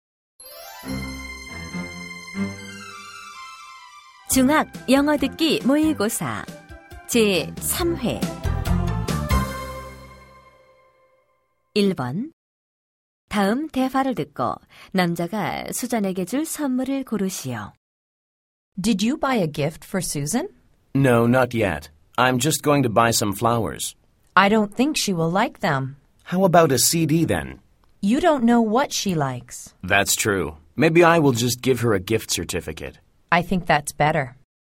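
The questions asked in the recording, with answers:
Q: 다음 대화를 듣고 남자가 수잔에게 줄 선물을 고르시오.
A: 상품권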